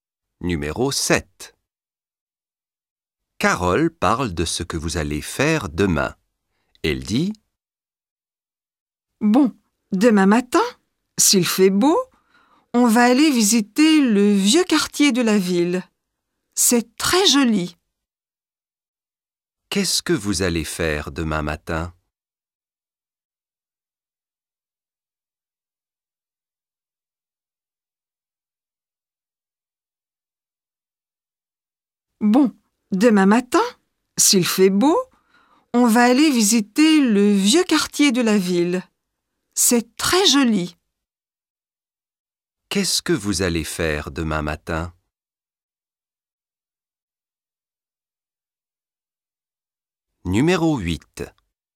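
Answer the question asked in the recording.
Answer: Visiter le vieux quartier de la ville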